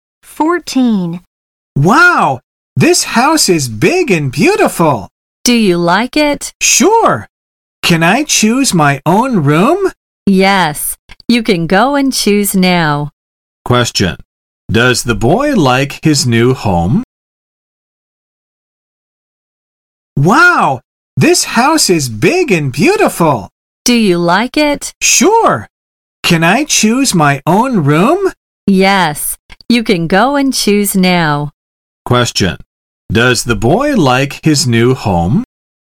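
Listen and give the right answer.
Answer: Yes, he does.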